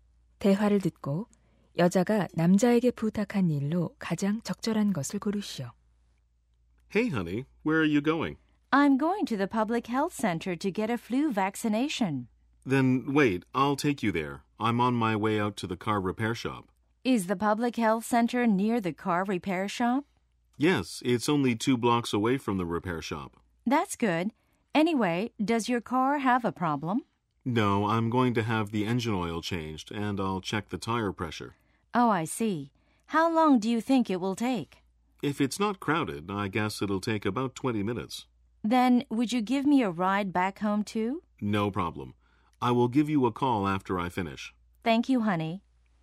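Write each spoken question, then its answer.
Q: 대화를 듣고 여자가 남자에게 부탁한 일로 가장 적절한 것을 고르시오.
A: 집까지 차로 태워다 주기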